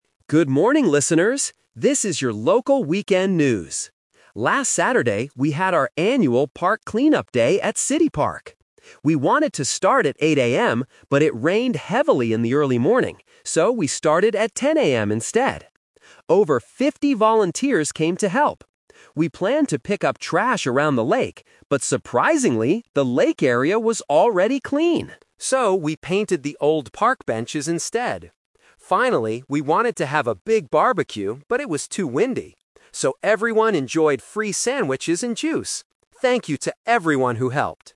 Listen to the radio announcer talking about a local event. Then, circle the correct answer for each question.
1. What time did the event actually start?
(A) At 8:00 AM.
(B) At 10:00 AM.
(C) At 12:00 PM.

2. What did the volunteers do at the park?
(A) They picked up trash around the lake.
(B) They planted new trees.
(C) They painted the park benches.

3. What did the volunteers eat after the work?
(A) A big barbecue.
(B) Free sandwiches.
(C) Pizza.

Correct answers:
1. At 10:00 AM.
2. They painted the park benches.
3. Free sandwiches.

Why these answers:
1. The announcer says, "So, we started at 10 AM instead." Option (A) is the trap (The Twist); they wanted to start at 8 AM, but they couldn't because of the rain. Option (C) is never mentioned.
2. The announcer explains, "So, we painted the old park benches instead." Option (A) is the trap; they planned to pick up trash, but the lake was already clean. Option (B) is a plausible park activity, but it is not in the audio.
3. The announcer states, "So, everyone enjoyed free sandwiches and juice." Option (A) is the trap (The Twist); they wanted to have a barbecue, but it was too windy. Option (C) is never mentioned.

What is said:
Announcer: Good morning, listeners! This is your local weekend news. Last Saturday, we had our annual 'Park Clean-up Day' at City Park. We wanted to start at 8 AM, but it rained heavily in the early morning. So, we started at 10 AM instead. Over fifty volunteers came to help. We planned to pick up trash around the lake. But surprisingly, the lake area was already clean! So, we painted the old park benches instead. Finally, we wanted to have a big barbecue, but it was too windy.

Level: A2

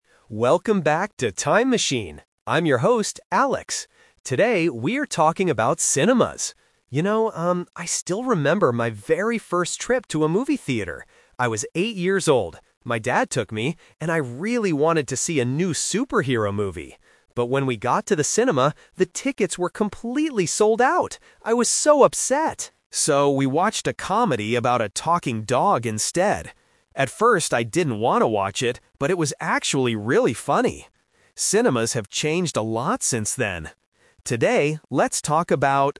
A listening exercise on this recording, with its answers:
Listen to a podcast host talking about his first time at a movie theater. Then, read the questions below and choose the correct answer (A, B, or C) for each question.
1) What kind of movie did Alex want to see at first?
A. A comedy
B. A superhero movie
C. A cartoon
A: A superhero movie

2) Why didn't Alex and his dad watch the superhero movie?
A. The dad wanted to watch something else.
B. The tickets were all sold out.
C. Alex was too young for the movie.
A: The tickets were all sold out.

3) How did Alex feel about the comedy movie in the end?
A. He was very upset.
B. He thought it was boring.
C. He thought it was funny.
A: He thought it was funny.

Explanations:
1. Alex clearly says, "I really wanted to see a new superhero movie." Option (A) is a trap; a comedy is what they actually watched, not what he wanted at first. Option (C) is a plausible movie for an 8-year-old, but it is never mentioned in the audio.
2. Alex explains the situation by saying, "...the tickets were completely sold out." Option (A) is a trap; they watched the comedy, but not because the dad wanted to—it was because of the tickets. Option (C) is a plausible reason for a child, but it is not mentioned.
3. Alex says about the comedy, "...but it was actually really funny." Option (A) is a trap; he was upset earlier because the superhero movie was sold out, but he enjoyed the comedy. Option (B) is a trap; he didn't want to watch it "at first", but he didn't think it was boring.

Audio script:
Welcome back to 'Time Machine'. I'm your host, Alex. Today, we are talking about cinemas. You know, um, I still remember my very first trip to a movie theater. I was eight years old. My dad took me, and I really wanted to see a new superhero movie. But when we got to the cinema, the tickets were completely sold out. I was so upset! So, we watched a comedy about a talking dog instead. At first, I didn't want to watch it, but it was actually really funny.

